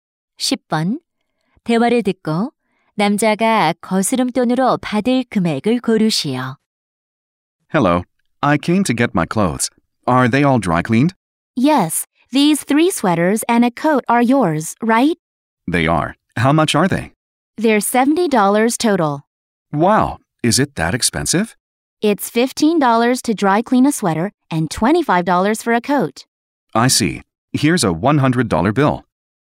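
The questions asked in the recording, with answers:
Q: 대화를 듣고 남자가 거스름돈으로 받을 금액을 고르시오.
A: 30달러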